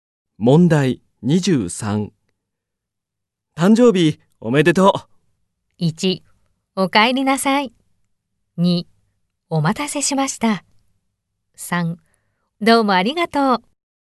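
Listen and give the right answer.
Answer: 3: どうもありがとう。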